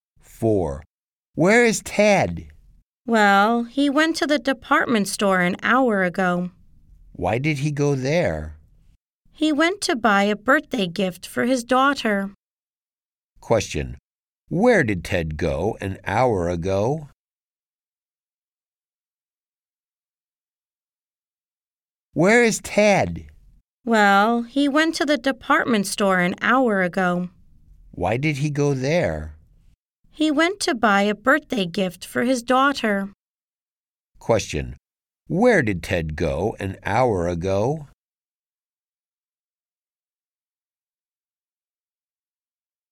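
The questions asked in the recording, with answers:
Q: Where did Ted go an hour ago?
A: To the department store.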